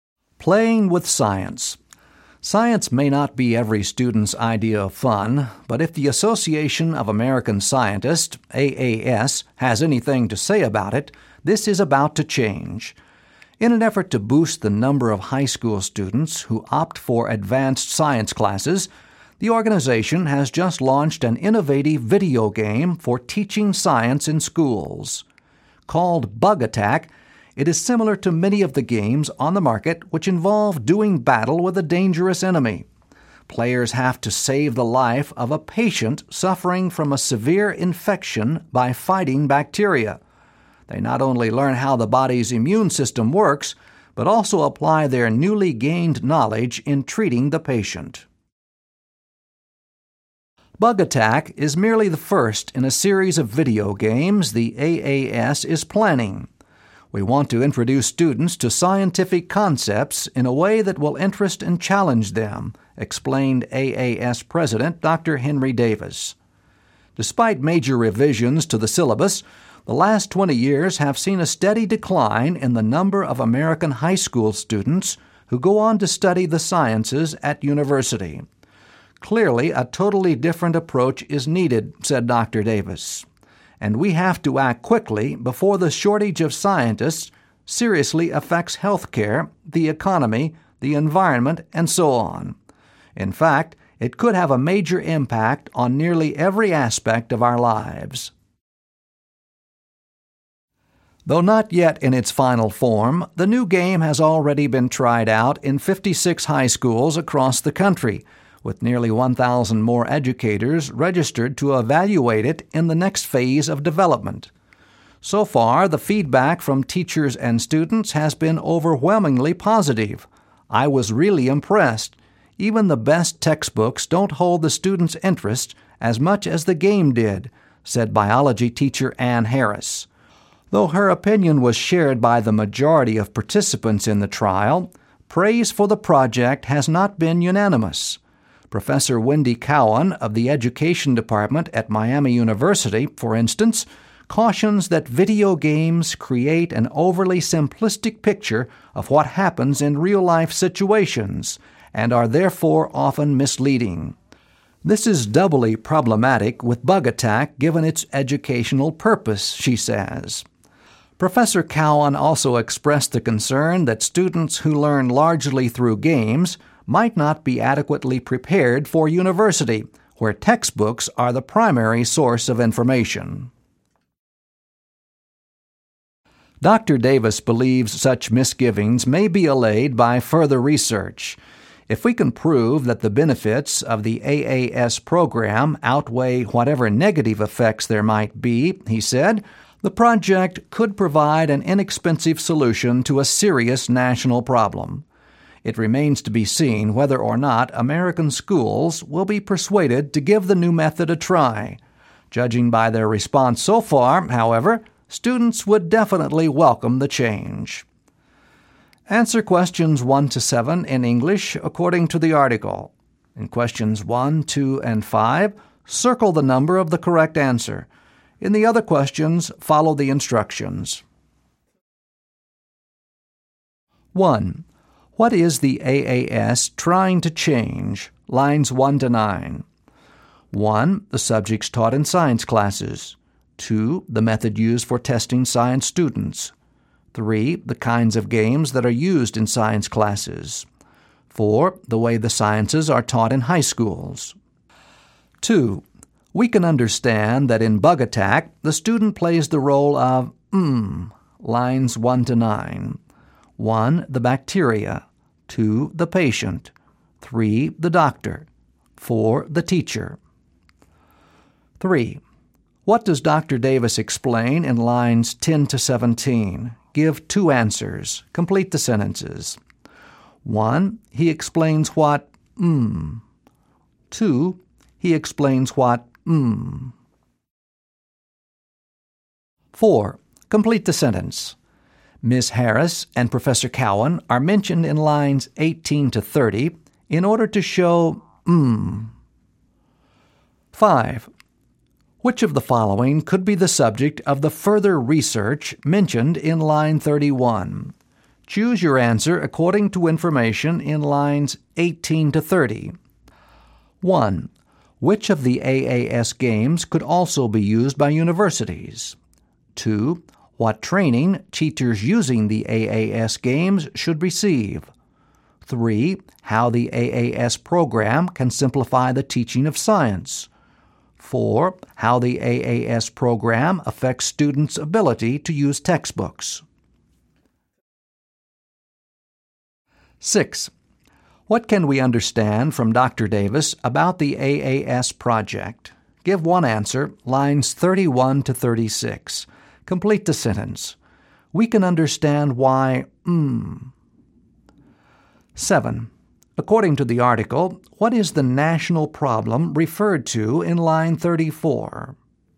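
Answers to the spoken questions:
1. 4: The way the sciences are taught in high schools.
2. 3: The doctor.
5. 4: How the AAS program affects students' ability to use textbooks.
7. A shortage of scientists, because fewer students go on to study science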